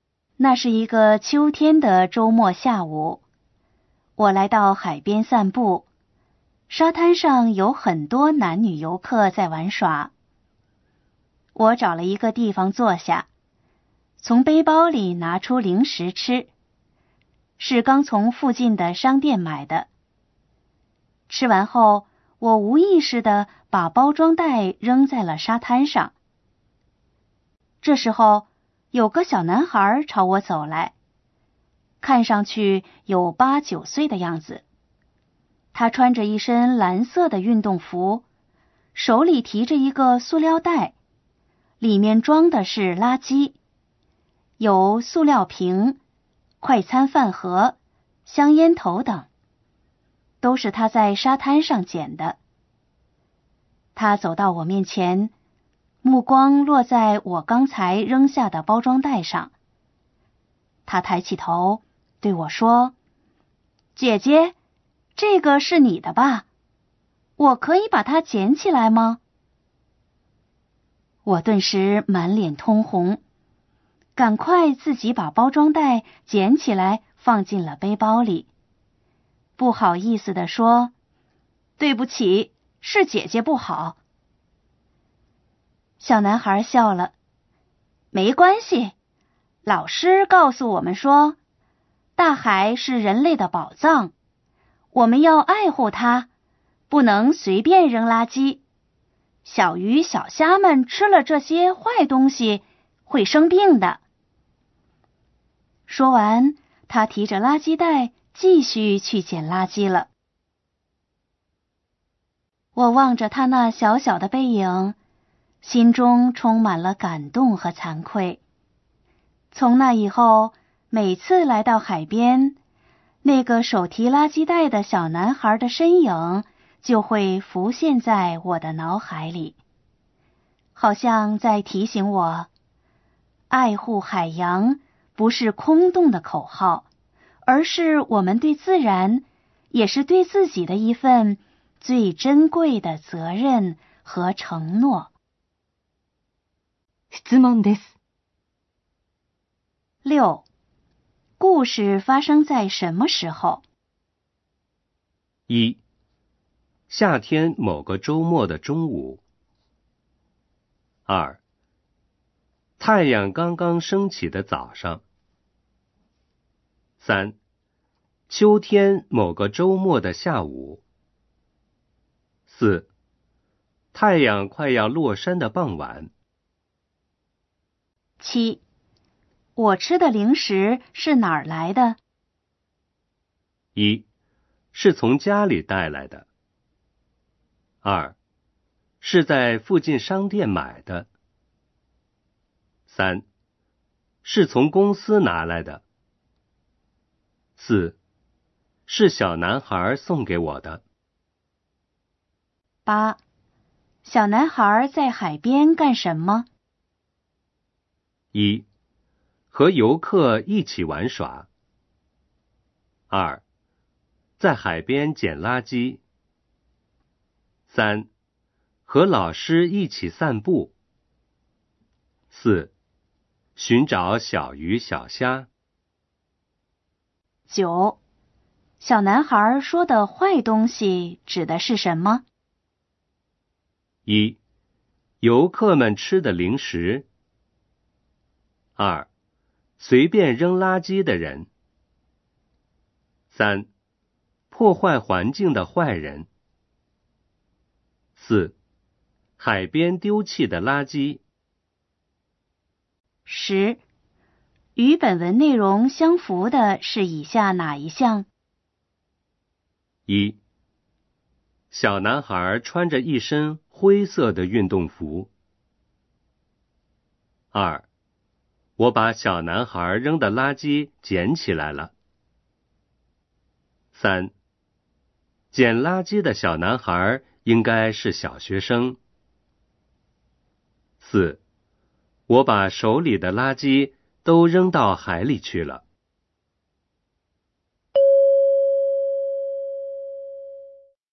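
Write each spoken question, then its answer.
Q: 故事发生在什么时候?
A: 三: 秋天某个周末的下午

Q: 我吃的零食是哪儿来的?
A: 二: 是在附近商店买的

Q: 小男孩在海边干什么?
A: 二: 在海边捡垃圾

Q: 小男孩说的坏东西指的是什么?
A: 四: 海边丢弃的垃圾

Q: 与本文内容相符的是以下哪一项?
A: 三: 捡垃圾的小男孩应该是小学生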